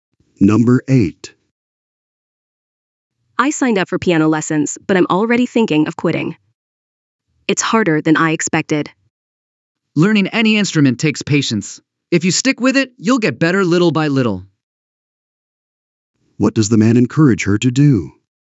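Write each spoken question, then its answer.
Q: What does the man encourage her to do?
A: Keep going with the piano lessons and be patient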